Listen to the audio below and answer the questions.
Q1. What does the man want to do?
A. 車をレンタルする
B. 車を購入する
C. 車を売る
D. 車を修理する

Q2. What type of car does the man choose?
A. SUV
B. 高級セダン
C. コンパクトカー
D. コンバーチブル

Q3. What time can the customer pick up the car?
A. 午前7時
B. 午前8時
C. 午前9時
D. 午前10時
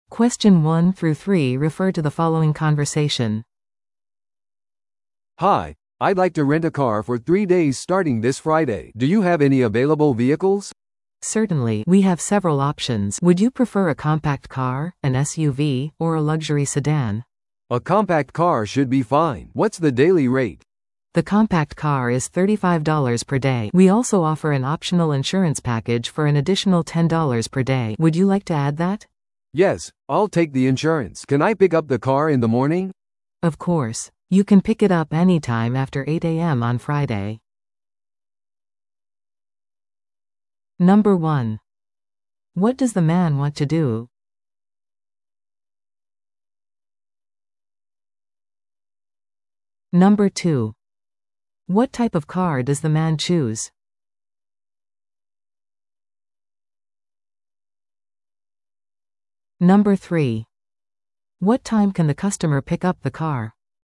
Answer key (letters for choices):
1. A
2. C
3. B

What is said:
A: "Hi, I'd like to rent a car for three days starting this Friday. Do you have any available vehicles?"
B: "Certainly! We have several options. Would you prefer a compact car, an SUV, or a luxury sedan?"
A: "A compact car should be fine. What's the daily rate?"
B: "The compact car is $35 per day. We also offer an optional insurance package for an additional $10 per day. Would you like to add that?"
A: "Yes, I'll take the insurance. Can I pick up the car in the morning?"
B: "Of course! You can pick it up anytime after 8 AM on Friday."